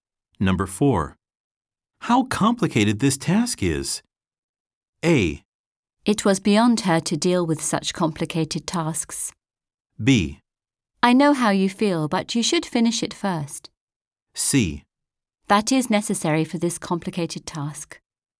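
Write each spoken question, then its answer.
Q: How complicated this task is.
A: B: I know how you feel, but you should finish it first.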